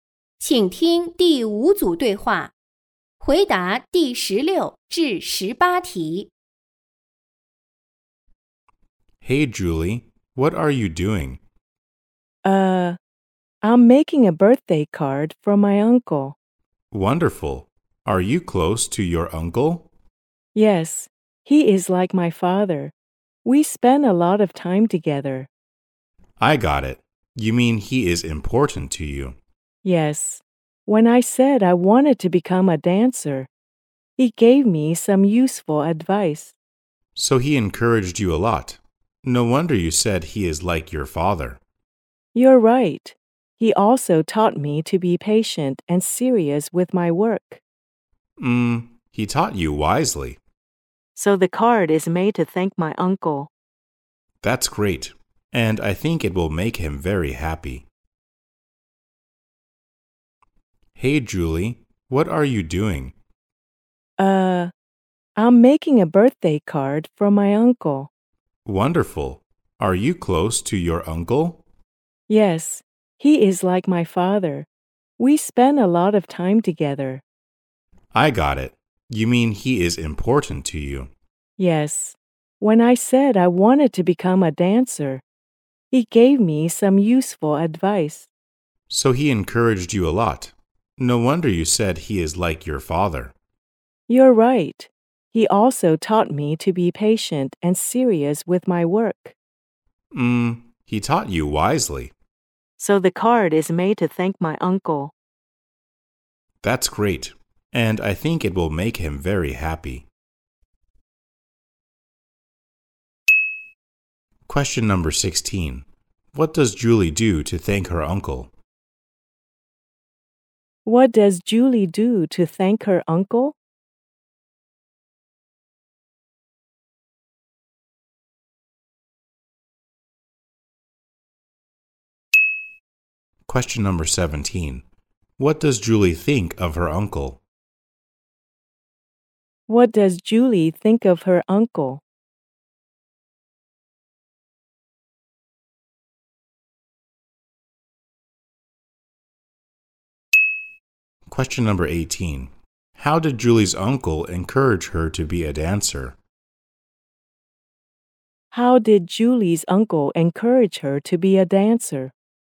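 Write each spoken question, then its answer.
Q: What does Julie do to thank her uncle?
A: She makes a birthday card for him

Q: What does Julie think of her uncle?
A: He is like her father; important to her

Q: How did Julie's uncle encourage her to be a dancer?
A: By giving her some useful advice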